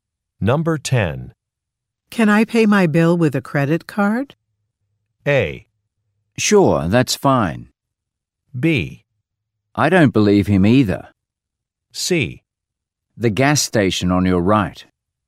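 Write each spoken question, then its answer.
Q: Can I pay my bill with a credit card?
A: A: Sure, that's fine.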